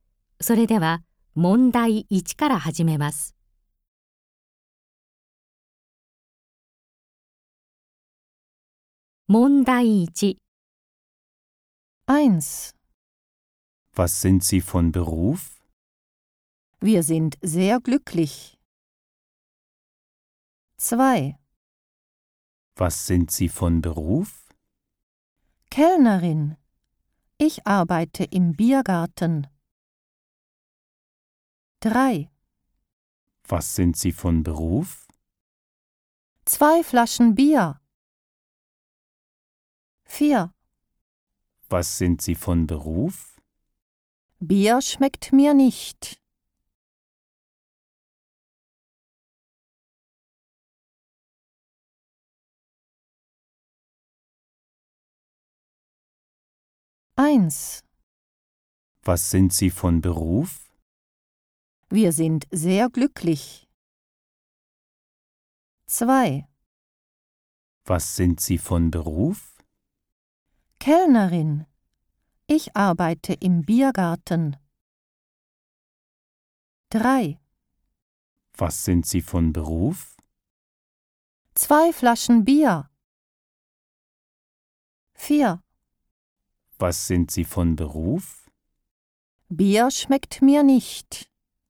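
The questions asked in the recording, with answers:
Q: Was sind Sie von Beruf?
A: 2: Kellnerin. Ich arbeite im Biergarten.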